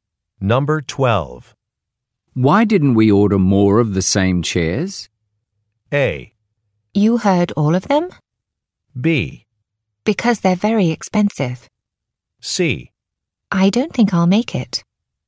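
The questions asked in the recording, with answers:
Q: Why didn't we order more of the same chairs?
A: B: Because they're very expensive.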